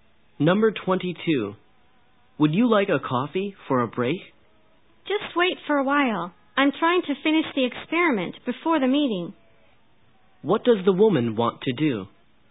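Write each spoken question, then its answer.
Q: What does the woman want to do?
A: Finish the experiment before the meeting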